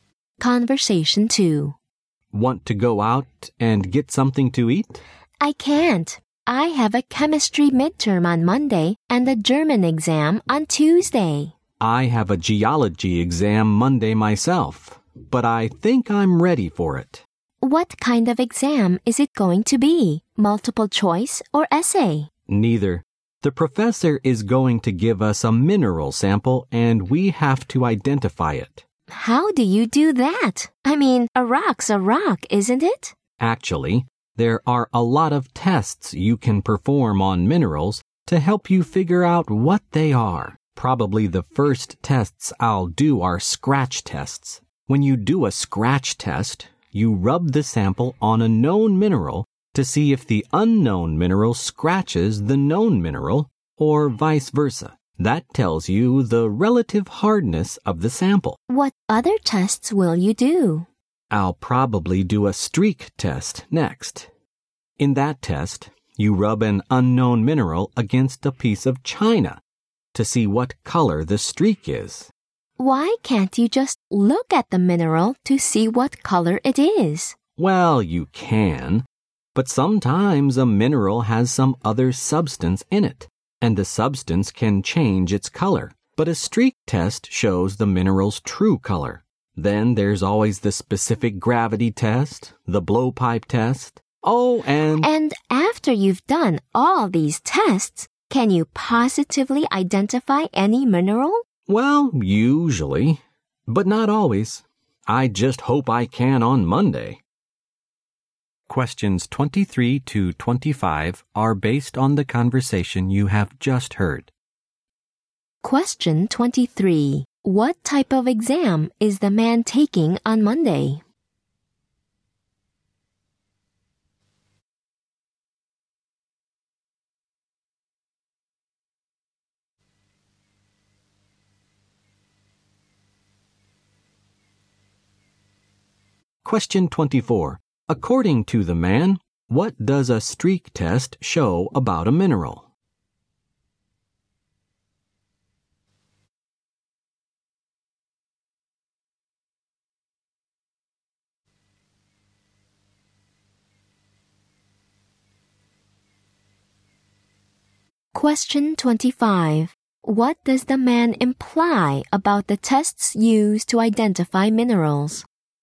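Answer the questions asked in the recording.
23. A geology exam identifying a mineral sample
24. Its true color
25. They usually, but not always, identify a mineral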